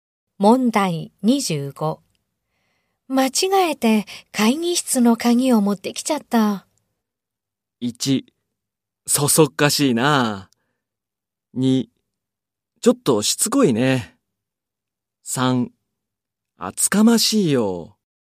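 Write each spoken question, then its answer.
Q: 間違えて会議室の鍵を持ってきちゃった。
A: 1: そそっかしいな。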